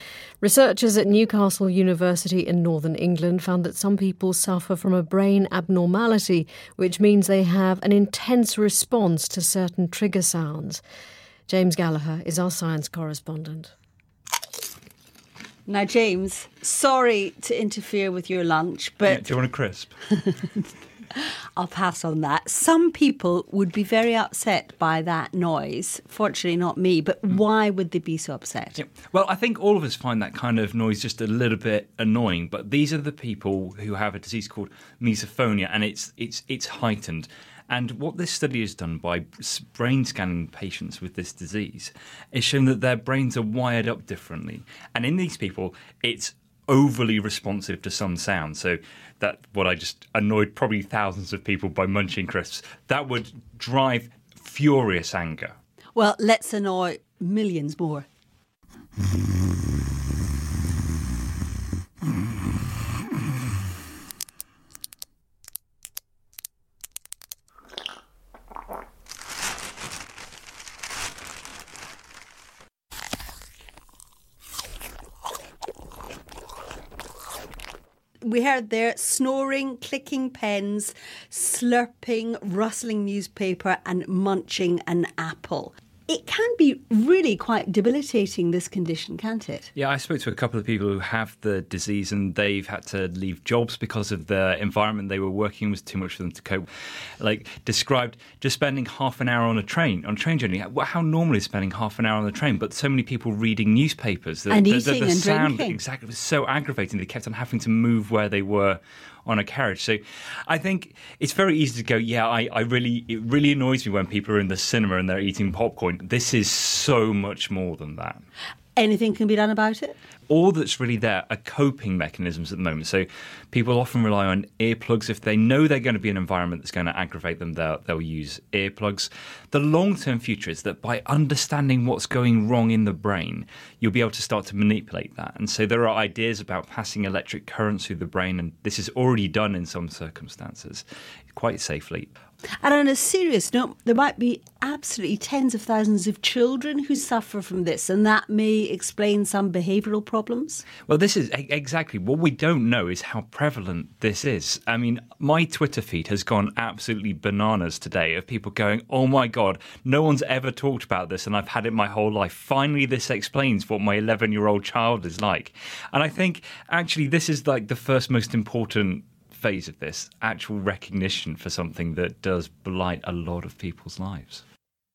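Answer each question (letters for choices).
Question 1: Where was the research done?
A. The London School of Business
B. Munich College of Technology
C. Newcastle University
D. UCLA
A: C

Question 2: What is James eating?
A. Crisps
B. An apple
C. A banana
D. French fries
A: A

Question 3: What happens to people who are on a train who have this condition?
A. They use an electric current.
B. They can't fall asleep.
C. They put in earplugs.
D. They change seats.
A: D

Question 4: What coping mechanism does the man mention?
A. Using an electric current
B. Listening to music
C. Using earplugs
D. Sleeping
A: C

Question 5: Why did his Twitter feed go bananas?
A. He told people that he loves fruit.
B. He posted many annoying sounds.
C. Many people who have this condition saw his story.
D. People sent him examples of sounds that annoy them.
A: C

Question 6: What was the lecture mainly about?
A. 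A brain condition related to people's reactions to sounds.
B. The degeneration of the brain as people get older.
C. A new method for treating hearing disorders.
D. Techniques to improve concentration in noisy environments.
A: A

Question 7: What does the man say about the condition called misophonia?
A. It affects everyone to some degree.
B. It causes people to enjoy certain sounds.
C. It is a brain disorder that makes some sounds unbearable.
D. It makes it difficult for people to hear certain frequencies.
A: C

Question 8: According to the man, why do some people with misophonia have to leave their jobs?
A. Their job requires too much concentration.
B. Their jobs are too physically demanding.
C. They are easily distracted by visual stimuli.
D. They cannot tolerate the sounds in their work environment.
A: D

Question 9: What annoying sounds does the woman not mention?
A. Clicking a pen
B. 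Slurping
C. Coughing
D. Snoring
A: C

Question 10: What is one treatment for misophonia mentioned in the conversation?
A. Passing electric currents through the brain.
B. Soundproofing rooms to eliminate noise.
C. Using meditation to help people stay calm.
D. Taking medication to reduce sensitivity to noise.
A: A

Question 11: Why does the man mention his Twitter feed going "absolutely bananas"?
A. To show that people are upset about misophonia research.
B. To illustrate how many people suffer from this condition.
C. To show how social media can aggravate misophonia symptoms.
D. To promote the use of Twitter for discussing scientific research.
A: B

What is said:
Researchers at Newcastle University in northern England found that some people suffer from a brain abnormality, which means they have an intense response to certain trigger sounds. James Gallaher is our science correspondent.
Now, James, sorry to interfere with your lunch, but...
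Do you want a crisp?
I'll pass on that. Some people would be very upset by that noise, fortunately not me. But why would they be so upset?
Well, I think all of us find that kind of noise just a little bit annoying, but these are the people who have a disease called misophonia, and it's heightened. What this study has done, by brain scanning patients with this disease, is shown that their brains are wired up differently. And in these people, it's overly responsive to some sounds. So, that what I just did annoyed probably thousands of people by munching crisps, that would drive furious anger.
Well, let's annoy millions more.
We heard there: snoring, clicking pens, slurping, rustling newspaper, and munching an apple.
It can be really quite debilitating, this condition, can't it?
Yeah, I spoke to a couple of people who have the disease, and they've had to leave jobs because the environment they were working in was too much for them to cope with. 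Like One described just spending half an hour on a train—how normal is spending half an hour on the train? But so many people reading newspapers, the sound was so aggravating they kept on having to move where they were on a carriage.
I think it's very easy to say, 'Yeah, it really annoys me when people are in the cinema and they're eating popcorn,' but this is so much more than that.
Anything can be done about it?
All that's really there are coping mechanisms at the moment. So, people often rely on earplugs. If they know they're going to be in an environment that's going to aggravate them, they'll use earplugs.
The long-term future is that by understanding what's going wrong in the brain, you'll be able to start to manipulate that. And so, there are ideas about passing electric currents through the brain, and this is already done in some circumstances, quite safely.
On a serious note, there might be absolutely tens of thousands of children who suffer from this, and that may explain some behavior problems.
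Well, this is exactly. What we don't know is how prevalent this is. My Twitter feed has gone absolutely bananas today, with people going, 'Oh my God, no one's ever talked about this, and I've had it my whole life. Finally, this explains what my 11-year-old child is like.'
I think, actually, this is like the first most important phase of this: actual recognition for something that does blight a lot of people's lives.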